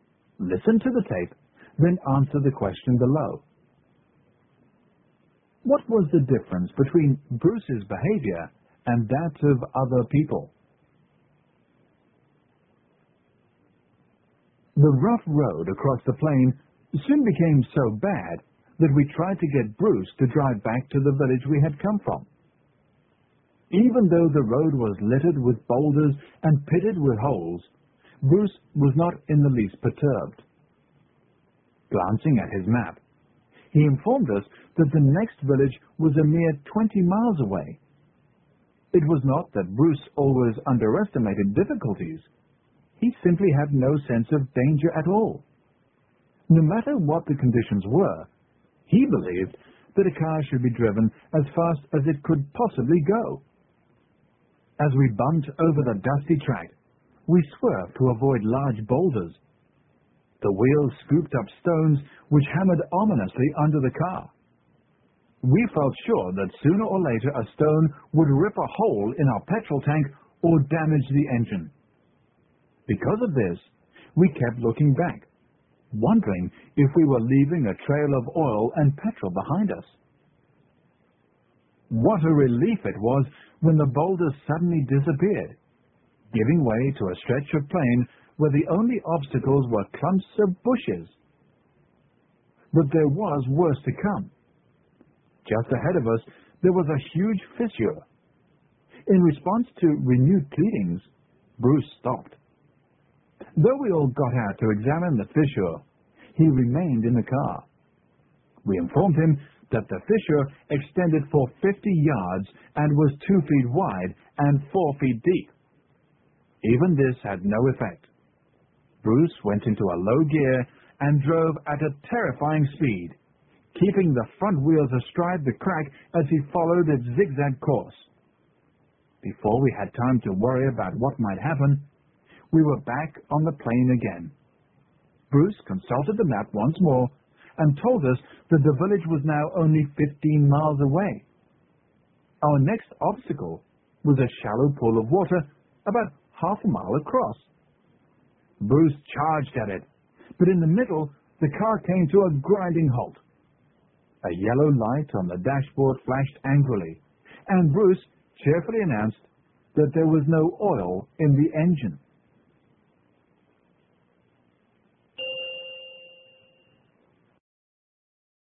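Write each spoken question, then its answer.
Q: What was the difference between Bruce's behavior and that of other people?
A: Bruce had no sense of danger and was never worried, while the others were frightened and worried about the dangers.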